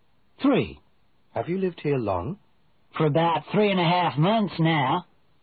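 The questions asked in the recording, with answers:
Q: Have you lived here long?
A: about 3.5 months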